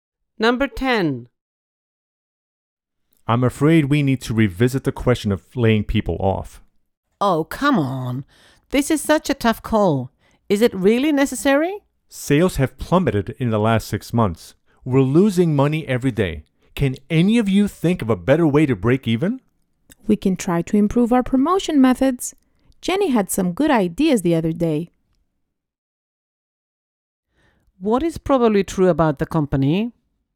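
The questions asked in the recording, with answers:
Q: What is probably true about the company?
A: It is losing money and may lay people off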